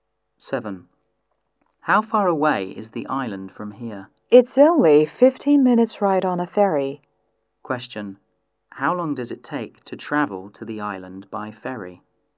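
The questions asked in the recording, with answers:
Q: How long does it take to travel to the island by ferry?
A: 15 minutes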